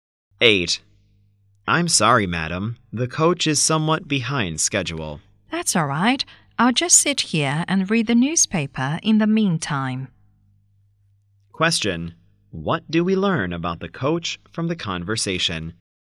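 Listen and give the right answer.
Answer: It is late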